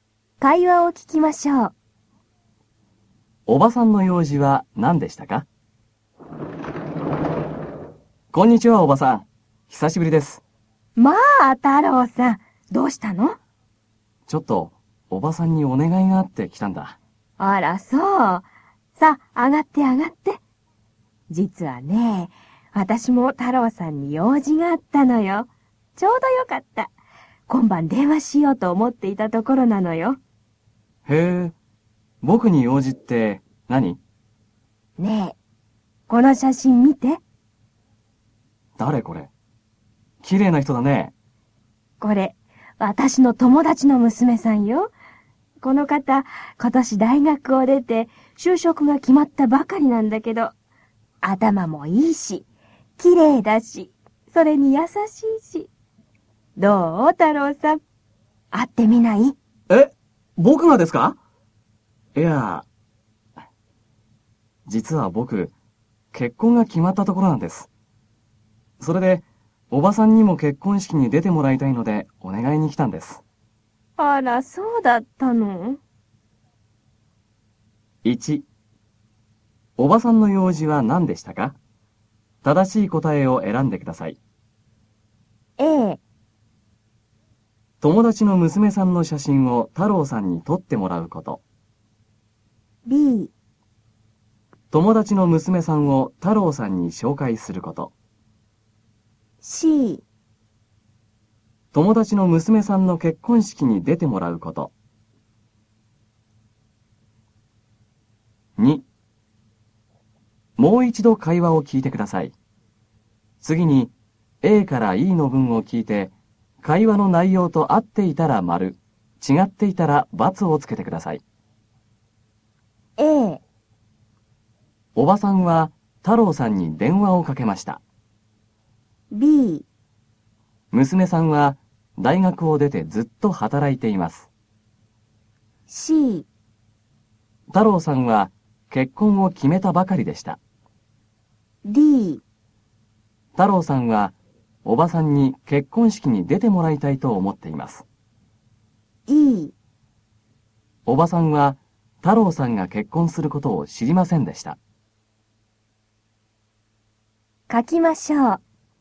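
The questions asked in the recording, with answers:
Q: おばさんの用事は何でしたか?正しい答えを選んでください。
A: B: 友達の娘さんを太郎さんに紹介すること。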